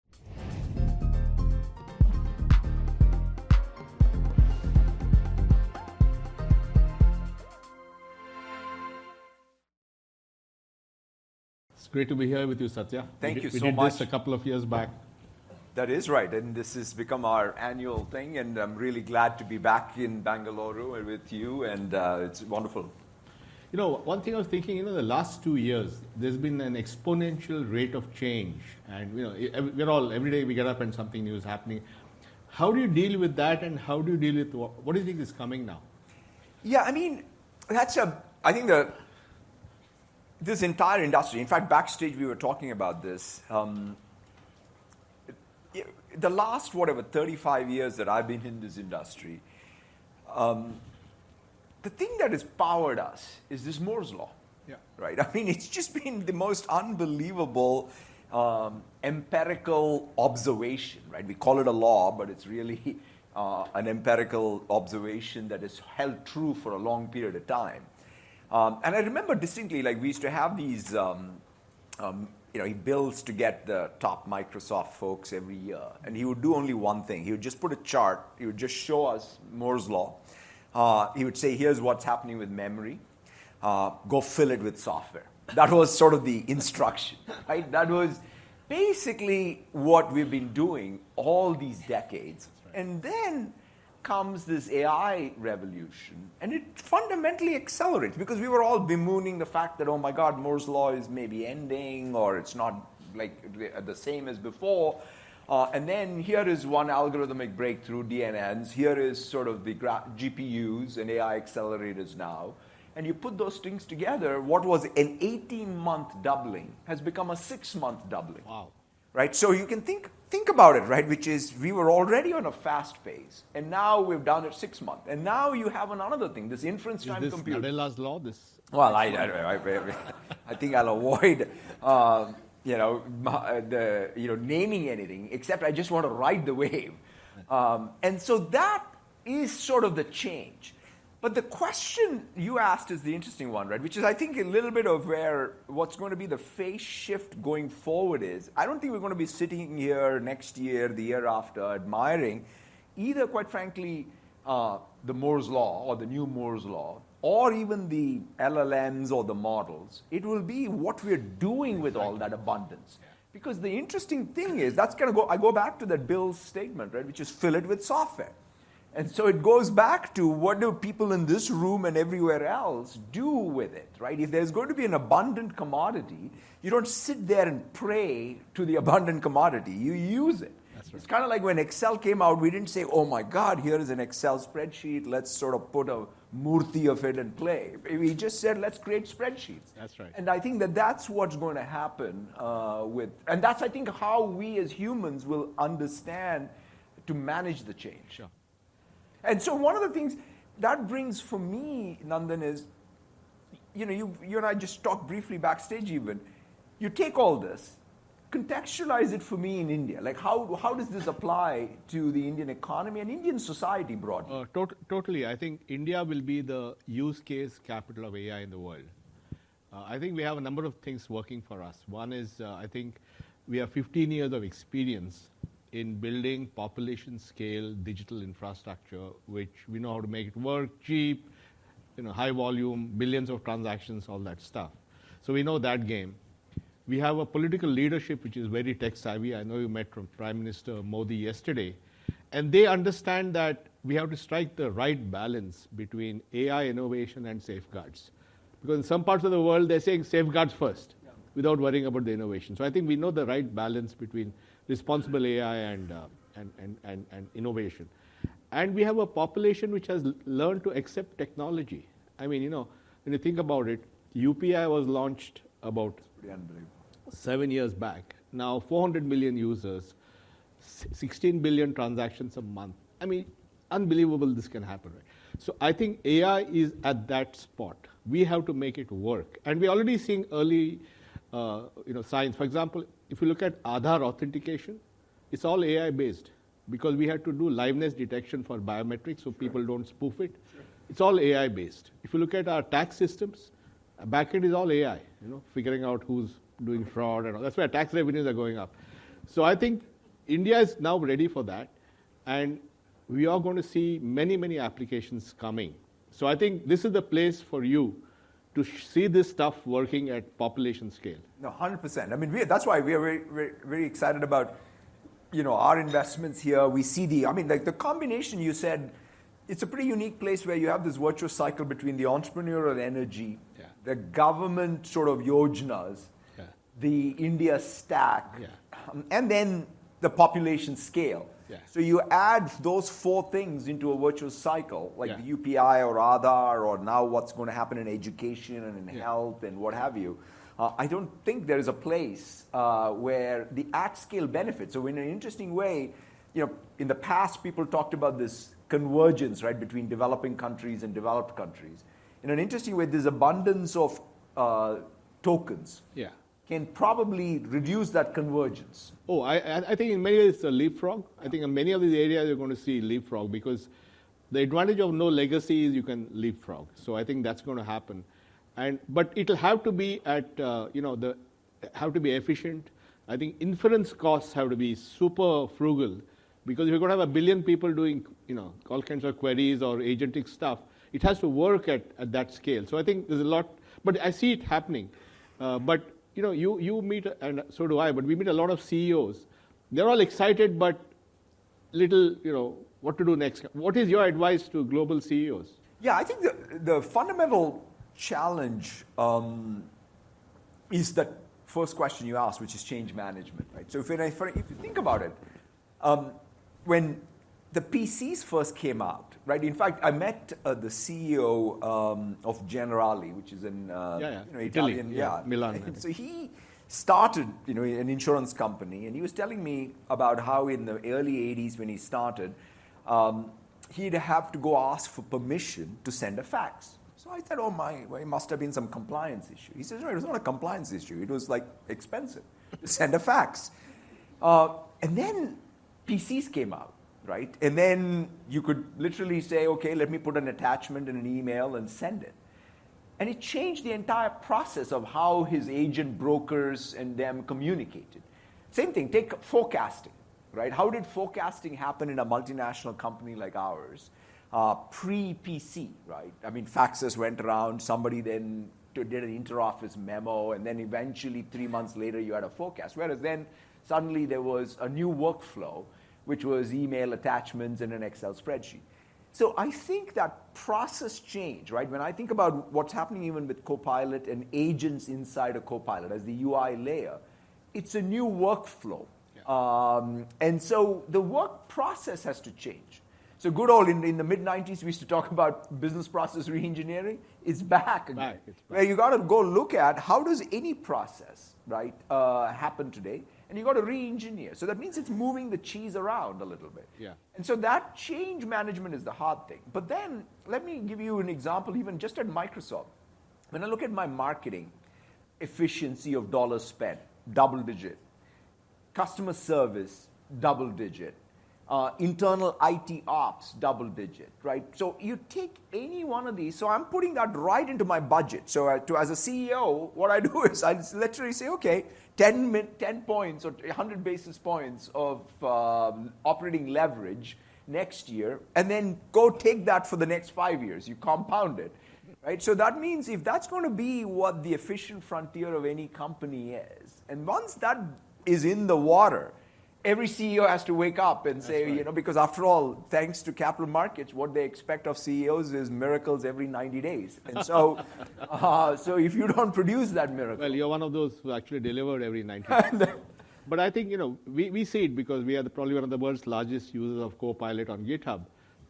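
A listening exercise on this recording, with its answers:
用 1-2 句话用自己的话回答下面的问题。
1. According to Satya, what was the specific instruction Bill Gates gave Microsoft employees each year using the Moore's law chart, and what did Satya say the doubling rate of progress has changed from and to?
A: "Here's what's happening with memory, go fill it with software"; the doubling has gone from every 18 months to every six months.

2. Nandan mentioned specific statistics about UPI to illustrate India's tech adoption. What were the exact numbers he gave for UPI's users and monthly transactions since its launch seven years ago?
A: 400 million users and 16 billion transactions a month.

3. Satya gave an example of a CEO he met from an Italian insurance company, General Ali, to illustrate change management. What specific reason did this CEO give for having to ask permission to send a fax in the early 1980s?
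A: Sending a fax was expensive; it was not a compliance issue.

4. Satya mentioned concrete efficiency improvements at Microsoft to advise CEOs. What three specific areas showed double-digit percentage improvements, and what operating leverage percentage did he say he puts into his budget for the next year?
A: Marketing efficiency, customer service and internal IT ops; he budgets 10 points (he also says 100 basis points) of operating leverage for next year.

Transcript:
It's great to be here with you Satya. Thank you so much a couple of years back
That is right
And this is become our annual thing and I'm really glad to be back in Bangalore with you and it's wonderful
You know one thing I was thinking you know the last two years
There's been an exponential rate of change and you know every day we get up and something news happening
How do you deal with that and how do you deal with what do you think is coming now?
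Yeah, I mean that's a I think the
This entire industry in fact backstage. We were talking about this
Yeah, I mean that's a I think think the this entire industry in fact backstage we were talking about this um the last whatever 35 years that I've been in this industry um the thing that has powered us is this Moore's law. Yeah. Right. I mean it's just been the most unbelievable um empirical observation. Right. We call it a law but it's really uh an empirical observation that is held true for a long period of time.
Um and I remember distinctly like we used to have these um um you know he builds to get the top Microsoft folks every year and he would do only one thing. He would just put a chart. He would just show us Moors law. Uh he would say here's what's happening with memory. Uh go fill it with software. That was sort of the instruction right that was basically what we've been doing all these decades. 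And then comes this AI revolution and it fundamentally accelerates because we were
all bemooning the fact that oh my god Moors law is maybe ending or it's not like the same as before. Uh and then here is one algorithmic breakthrough DNN's here is sort of the graph GPUs and AI accelerators now and you put those things together what was an 18month doubling has become a six-month doubling. Wow. Right. So you can think think about it right which is we were already on a fast pace and now we've done it six month and now you have another thing this
inference time comput's law this well I I think I'll avoid u you know the you know naming anything except I just want to ride the wave um and so that is sort of the change but the question you asked is the interesting one right which is I think a little bit of where what's going to be the phase shift going forward is I don't think we're going be sitting here next year, the year after admiring either quite frankly uh the Moors law or the new Moors
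law or even the LLMs or the models. It will be what we're doing with all that abundance because the interesting thing is that's kind of go I go back to that bill's statement, right, which is fill it with software. And so it goes back to what do people in this room and everywhere else do with it, right? If there's going to be an abundant commodity, you don't sit there and pray to the abundant commodity. You use it. It's kind of like when Excel came out, we
didn't say, "Oh my god, here is an Excel spreadsheet. Let's sort of put a Morty of it and play." We just said, "Let's create spreadsheets." That's right. And I think that that's what's going to happen uh with and that's I think how we as humans will understand to manage the change. Sure. And so one of the things that brings for me Nandan is you know you you and I just talked briefly backstage even you take all this contextualize it for me in India like how how
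does this apply to the Indian economy and Indian society broadly uh to totally I think India will be the use case capital of AI in the world. Uh I think we have a number of things working for us. One is uh I think we have 15 years of experience in building population scale digital infrastructure which we know how to make it work cheap you know high volume billions of transactions all that stuff. So we know that game we have a political leadership which is very tech-savvy.
I know you met from Prime Minister Modi yesterday and they understand that we have to strike the right balance between AI innovation and safeguards because in some parts of the world they're saying safeguards first without worrying about the innovation. So I think we know the right balance between responsible AI and u and and and and innovation and we have a population which has learned to accept technology. I mean, you know, when you think about it, UPI was launched about pretty unbelievable. 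Seven years back now 400
million now 400 million users, 16 billion transactions a month. I mean, unbelievable this can happen, right? So, I think AI is at that spot. We have to make it work and we already seeing early uh you know signs for example if you look at Aadhaar authentication, it's all AI based because we had to do livveness detection for biometrics so people don't spoof it. It's all AI based. If you look at our tax systems, back end is all AI, you know, figuring out who's doing fraud and
all that's why tax revenues are going up. So I think India is now ready for that and we are going to see many many applications coming. So I think this is the place for you to see this stuff working at population scale. No, 100%. I mean we that's why we are very very excited about you know our investments here. We see the I mean like the combination you said it's a pretty unique place where you have this virtual cycle between the entrepreneurial energy the government sort
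of yojenas the India stack and then the population scale so you add those four things into a virtuous cycle like the UPI or Aadhaar or now what's going to happen in education and in health and what have you uh I don't think there is a place uh where the atcale benefit so in an interesting way You know in the past people talked about this convergence right between developing countries and developed countries in an interesting way there's abundance of uh tokens can probably reduce that convergence oh
I I think in many leaprog I think in many of these areas you're going to see leap frog because the advantage of no legacy is you can leaprog so I think that's going to happen and but it'll have to be at uh you know the have to be efficient I think inference costs have to be super frugal frugal because if you're going to have a billion people doing you know all kinds of queries or agentic stuff it has to work at at that scale so I
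think there's a lot but I see it happening but you know you you meet and so do I but we meet a lot of CEOs they're all excited but little you know what to do next what is your advice to global CEOs yeah I think the the fundamental challenge um is that first question you asked which is change management right so if I if you think about um when the PCs first came out, right? In fact, I met the CEO um of General Ali, which is
in Italian. Yeah. Milan.
What is your advice to global CEOs?
Yeah, I think the, the fundamental challenge, um, is that first question you asked, which is change management, right?
So if I, for, if you think about it, um, when the PCs first came out, right, in fact, I met, uh, the CEO, um, of Generali, which is in, uh, yeah, yeah, Italian.
Yeah, Milan.
So he started, you know, an insurance company and he was telling me about how in the early 80s when he started, um, he'd have to go ask for permission to send a FAX.
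So I said, oh, my way must have been some compliance issue.
He says, no, it was not a compliance issue.
It was like expensive to send a FAX.
Uh, and then PCs came out, right?
And then you could literally say, okay, let me put an attachment in an email and send it.
And it changed the entire process of how his agent brokers and them communicated.
Same thing, take forecasting, right?
How did forecasting happen in a multinational company like ours?
Pre PC, right?
I mean, faxes went around somebody, then you did an interoffice memo and then eventually three months later you had a forecast, whereas then suddenly there was a new workflow which was email attachments and an Excel spreadsheet.
So I think that process change, right, when I think about what's happening even with copilot and agents inside a copilot as the UI layer, it's a new workflow.
Um, and so the work process has to change.
So good old in the mid 90s we used to talk about business process reengineering.
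It's back again where you got to go look at how does any process, right, uh, happen today and you got to reengineer.
So that means it's moving the cheese around a little bit.
Yeah.
And so that change management is the hard thing.
But then let me give you an example.
Even just at Microsoft, when I look at my marketing efficiency of dollar spent, double digit, customer service, double digit, internal it ops, double digit, right?
So you take any one of these.
So I'm putting that right into my budget.
So to as a CEO, what I do is I literally say, okay, 10 minute, 10 points or 100 basis points of operating leverage next year and then go take that for the next five years.
You compound it, right?
So that means if that's going to be what the efficient frontier of any company is.
And once that is in the water, every CEO has to wake up and say, you know, because after all, thanks to capital markets, what they expect of CEOs is miracles every 90 days.
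And so, ah, so if you don't produce that miracle, well, you're one of those who actually delivered every 90.
But I think, you know, we, we see it because we are the probably one of the world's largest users of copilot.
On Github, you can see the impact already.
But it's not just about technology.
It's about process improvement.
It's about training people.
It's about changing mindsets.
You know, the whole human issue that have to deal with it.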